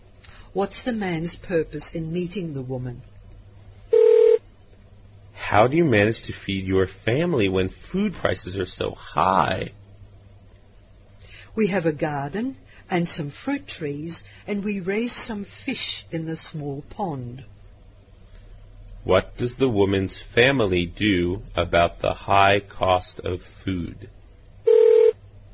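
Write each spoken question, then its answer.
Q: What does the woman's family do about the high cost of food?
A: They grow their own fruit and vegetables and raise fish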